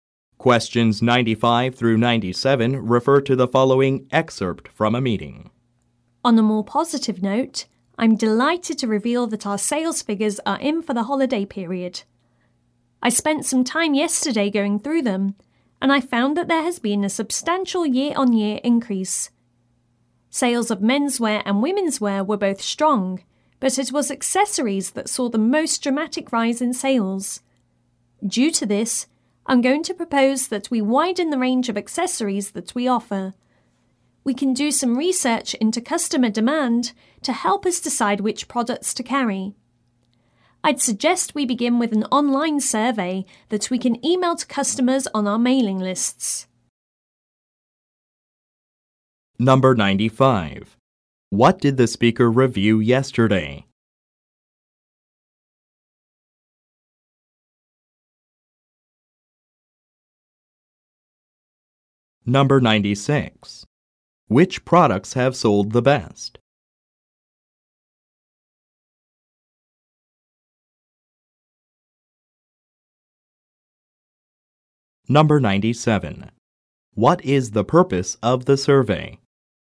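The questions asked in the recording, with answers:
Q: What did the speaker review yesterday?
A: Holiday sales figures

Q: Which products have sold the best?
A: Accessories

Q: What is the purpose of the survey?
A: To research customer demand to decide which accessories to carry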